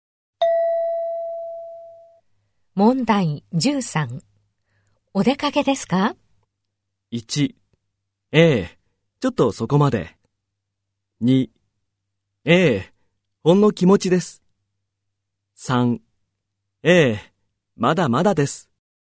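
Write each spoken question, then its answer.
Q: お出かけですか?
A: 1: ええ、ちょっとそこまで。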